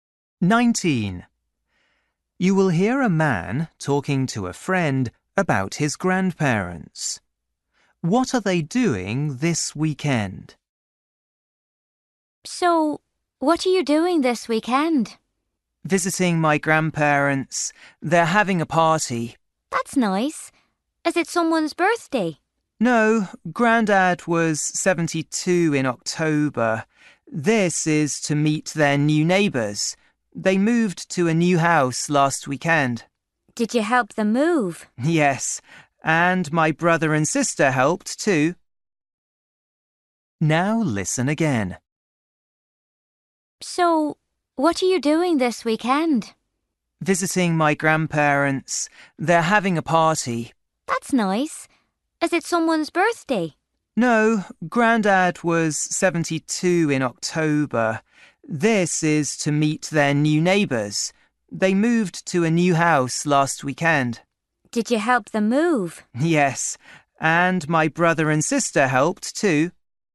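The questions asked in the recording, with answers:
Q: What are they doing this weekend?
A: having a party to meet their new neighbours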